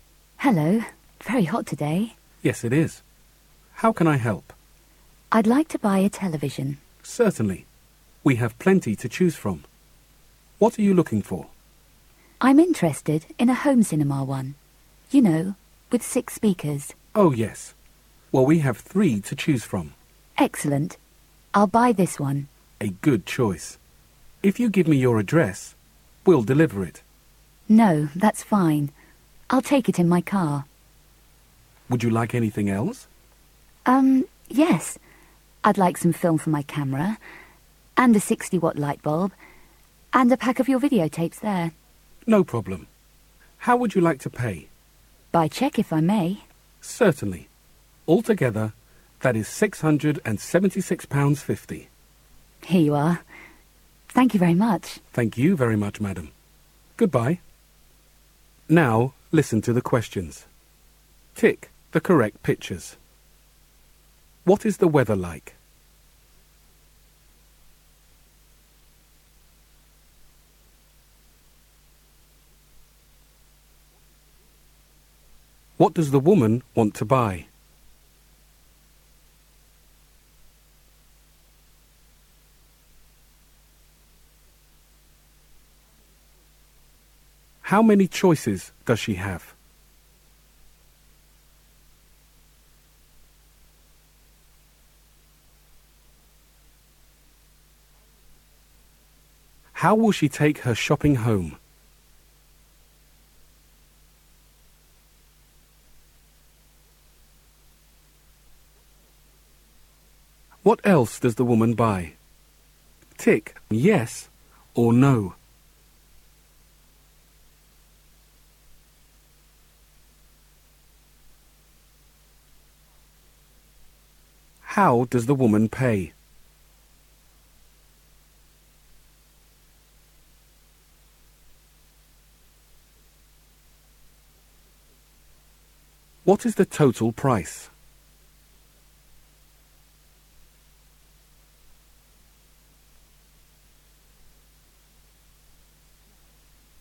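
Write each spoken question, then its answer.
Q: What is the weather like?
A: Very hot

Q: What does the woman want to buy?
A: A television (home cinema, 6 speakers)

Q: How will she take her shopping home?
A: In her car

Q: What else does the woman buy?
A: Camera film, a 60-watt light bulb and a pack of videotapes

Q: How does the woman pay?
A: By cheque

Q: What is the total price?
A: £676.50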